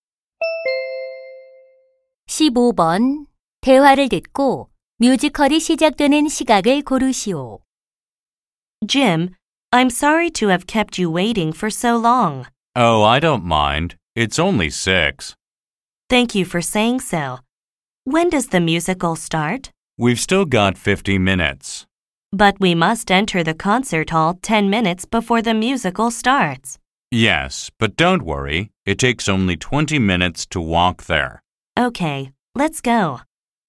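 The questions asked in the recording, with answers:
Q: 대화를 듣고 뮤지컬이 시작되는 시각을 고르시오.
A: 6시 50분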